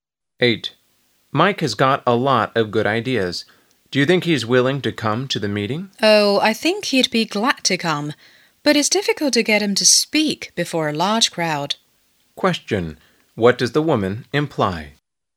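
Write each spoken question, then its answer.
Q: What does the woman imply?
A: Mike will come but probably won't speak much before a large crowd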